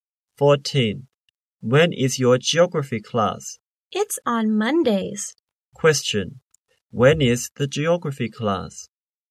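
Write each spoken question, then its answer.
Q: Question. When is the geography class?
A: On Mondays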